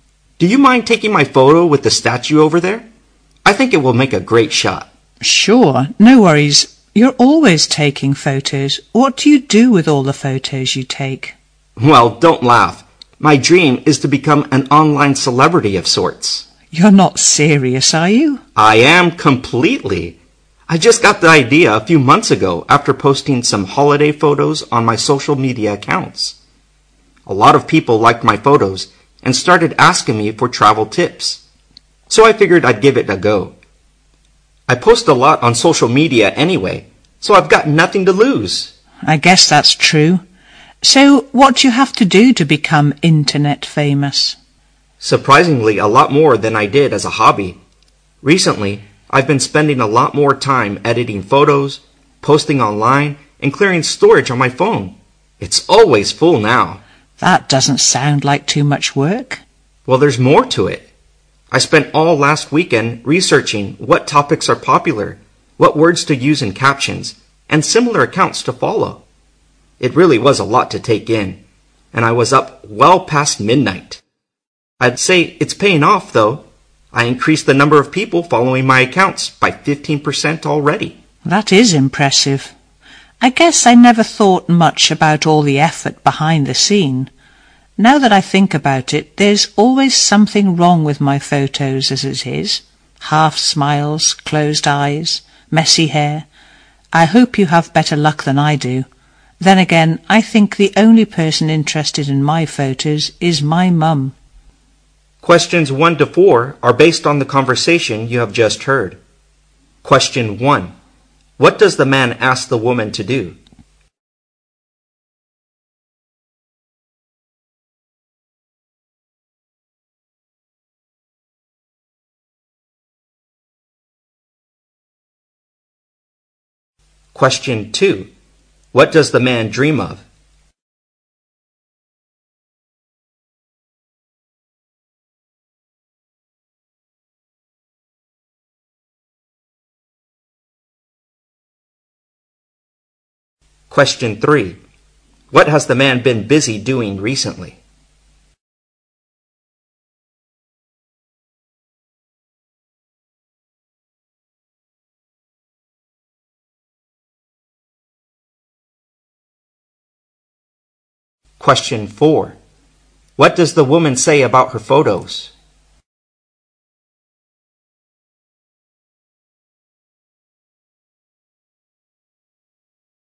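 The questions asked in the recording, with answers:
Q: What does the man ask the woman to do?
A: Take his photo with the statue

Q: What does the man dream of?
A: Becoming an online celebrity

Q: What has the man been busy doing recently?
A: Editing and posting photos online

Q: What does the woman say about her photos?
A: There's always something wrong with them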